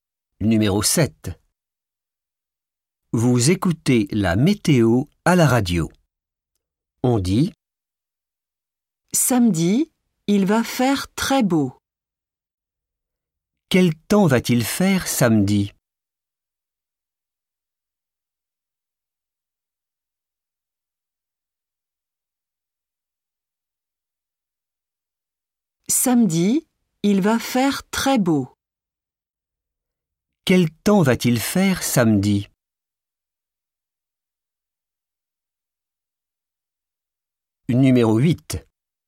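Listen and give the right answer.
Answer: très beau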